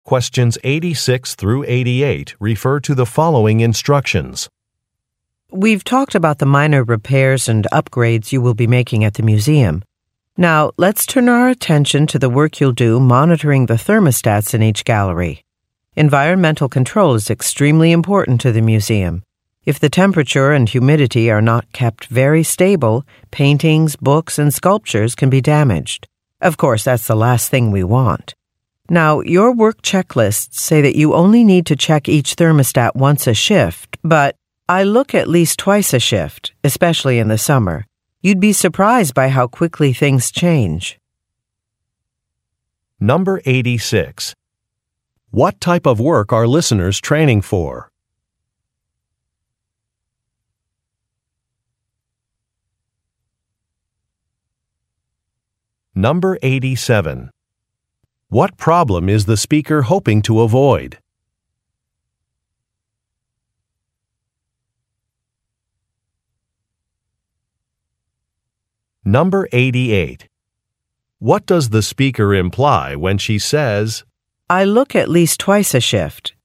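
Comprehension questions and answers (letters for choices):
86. What type of work are listeners training for?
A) Maintenance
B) Manufacturing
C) Research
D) Sales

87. What problem is the speaker hoping to avoid?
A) High energy costs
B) Long lines for the elevators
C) Damage to artwork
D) Noise in the galleries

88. What does the speaker imply when she says, "I look at least twice a shift"?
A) Listeners should follow her recommendation.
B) Listeners should sign up for more shifts.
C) She has already checked some equipment.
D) She will be conducting surprise inspections.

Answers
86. A
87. C
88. A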